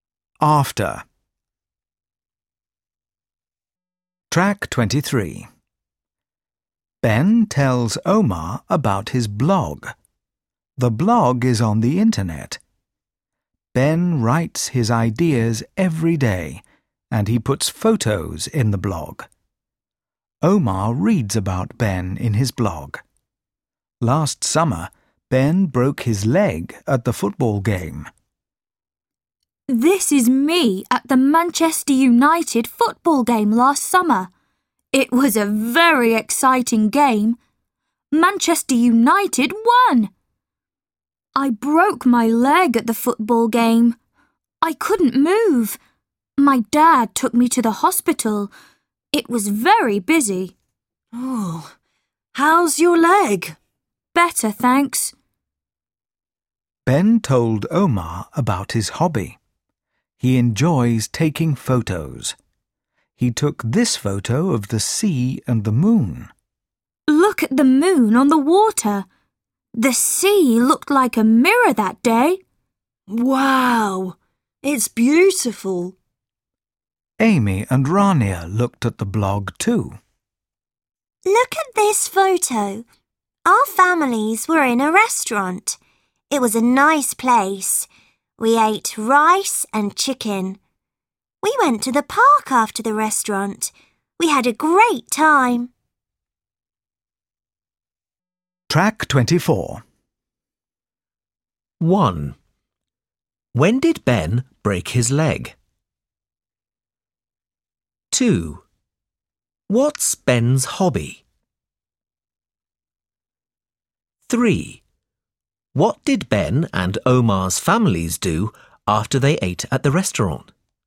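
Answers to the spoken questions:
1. Last summer, at the football game
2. Taking photos
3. They went to the park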